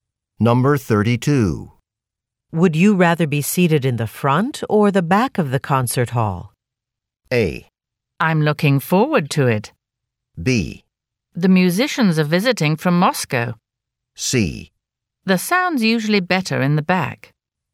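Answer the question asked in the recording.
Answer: C: The sound's usually better in the back.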